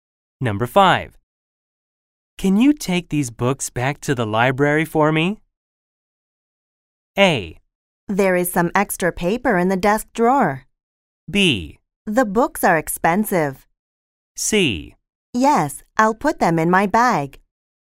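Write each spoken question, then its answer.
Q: Can you take these books back to the library for me?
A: C: Yes, I'll put them in my bag.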